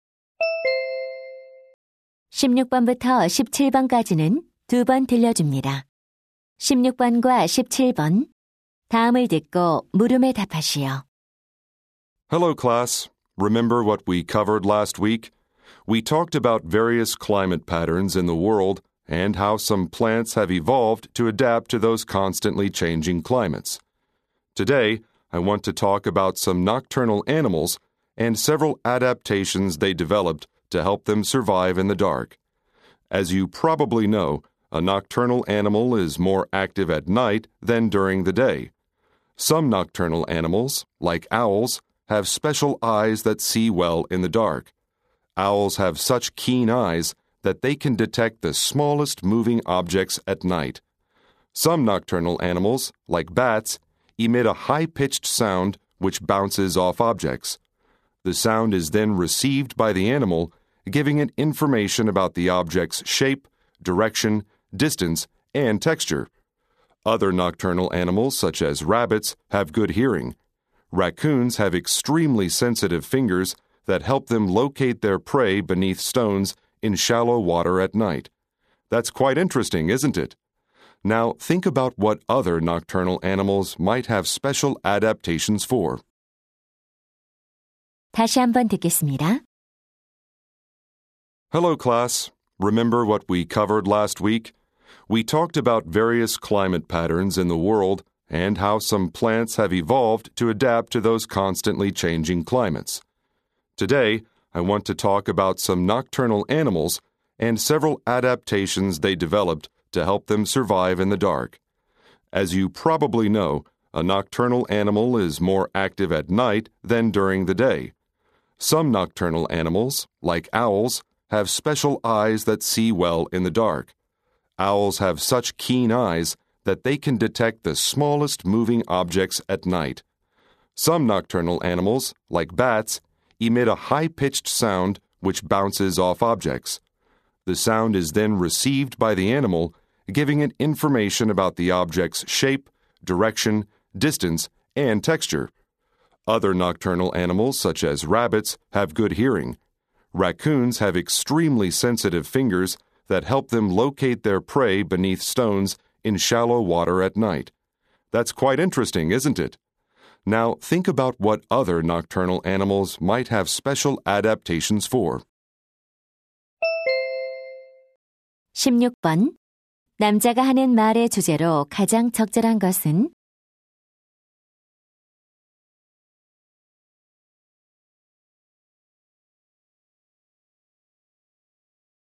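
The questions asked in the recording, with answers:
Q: 남자가 하는 말의 주제로 가장 적절한 것은?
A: 야행성 동물이 어둠 속에서 살아남기 위해 발달시킨 적응 방식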